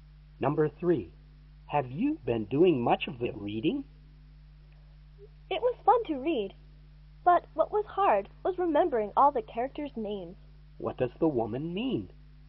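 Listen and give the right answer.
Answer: The reading was fun, but the characters' names were hard to remember.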